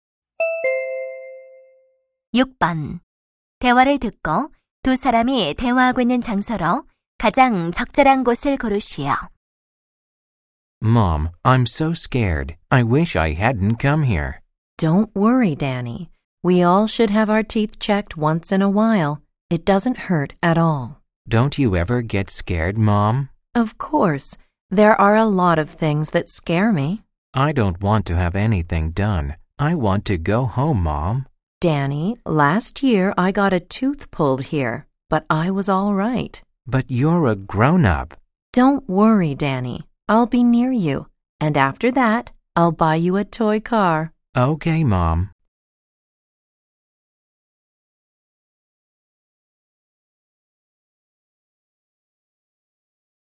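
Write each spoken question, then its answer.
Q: 대화를 듣고 두 사람이 대화하고 있는 장소로 가장 적절한 곳을 고르시오.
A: 치과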